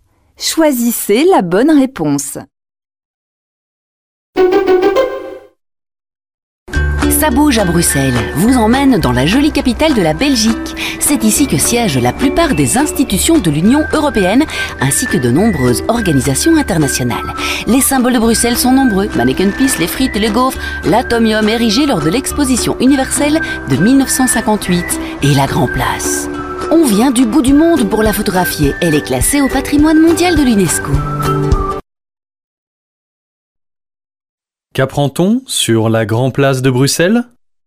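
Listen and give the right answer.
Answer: Elle est classée au patrimoine mondial de l'UNESCO.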